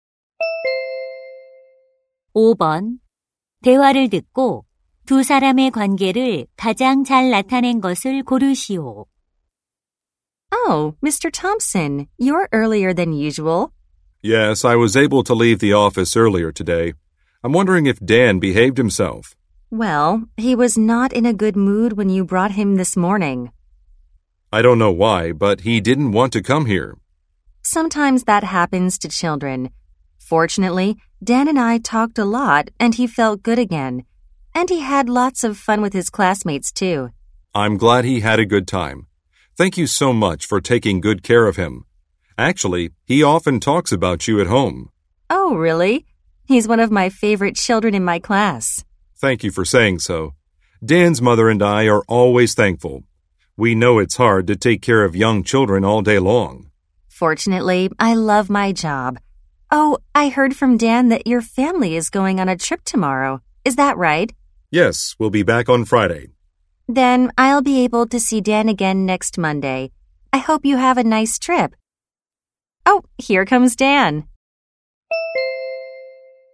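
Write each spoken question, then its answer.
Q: 대화를 듣고 두 사람의 관계를 가장 잘 나타낸 것을 고르시오.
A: 학부모 - 유치원 교사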